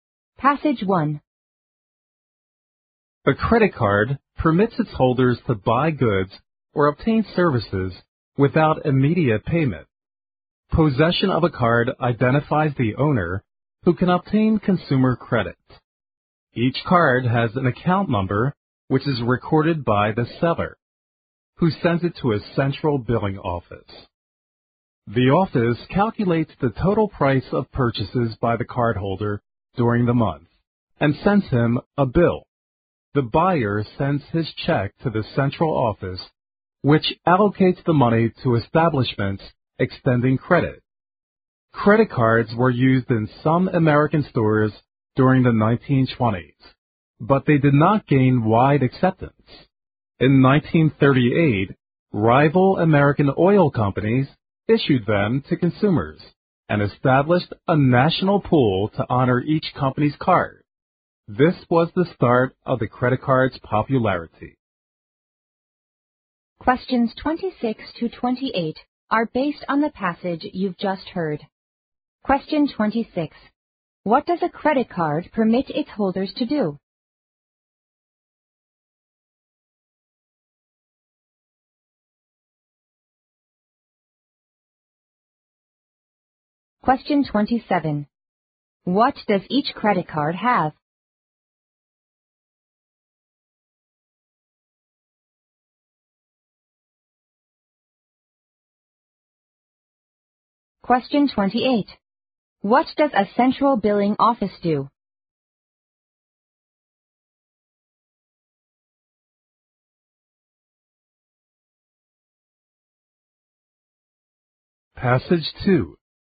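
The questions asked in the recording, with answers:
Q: What does a credit card permit its holders to do?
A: Buy goods or obtain services without immediate payment

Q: What does each credit card have?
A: An account number

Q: What does a central billing office do?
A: Calculates the cardholder's monthly purchases and sends a bill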